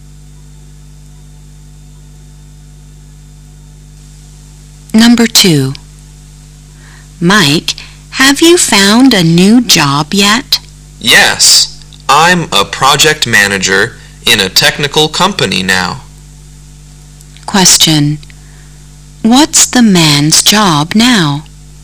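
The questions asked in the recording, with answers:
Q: What's the man's job now?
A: Project manager in a technical company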